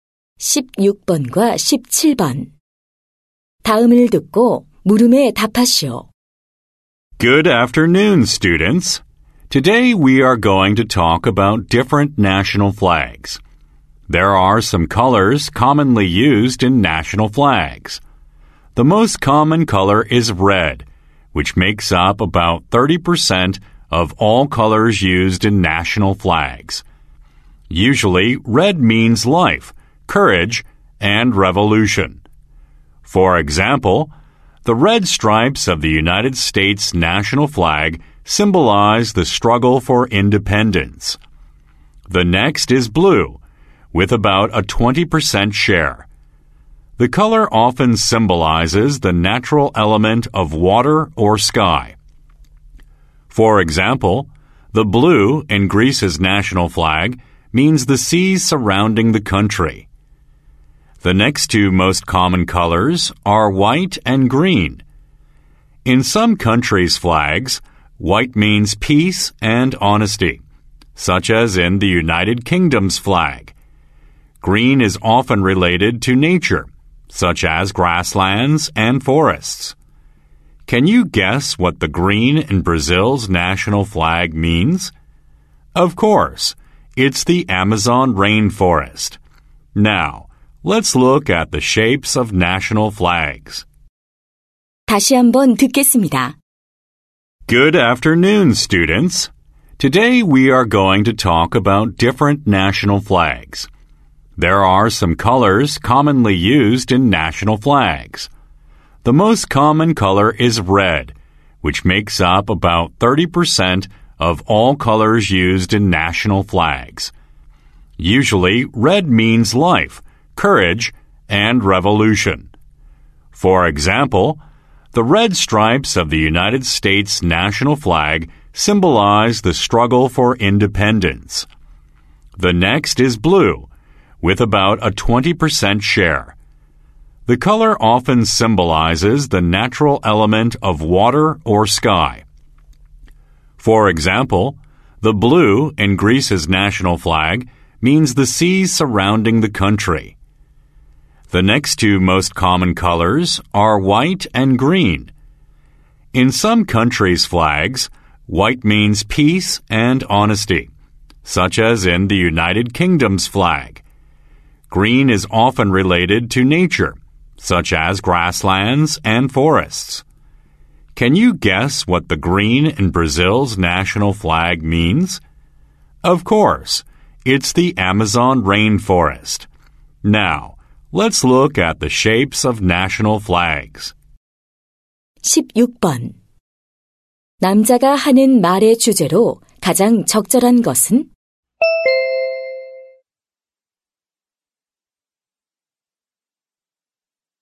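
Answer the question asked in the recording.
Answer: 국기에 흔히 쓰이는 색과 그 의미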